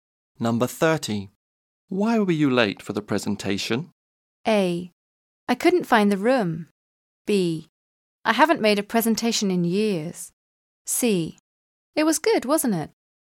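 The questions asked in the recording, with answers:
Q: Why were you late for the presentation?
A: A: I couldn't find the room.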